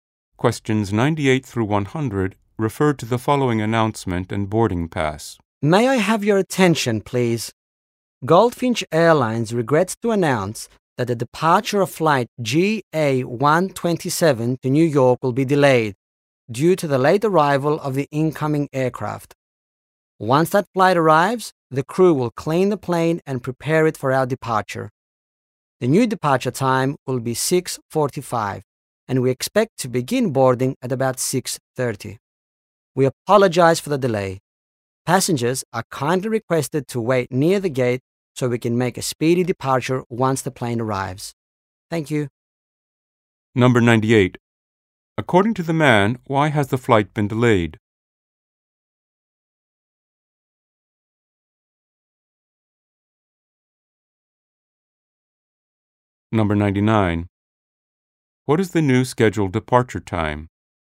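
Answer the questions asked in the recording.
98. Late arrival of the incoming aircraft
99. 6:45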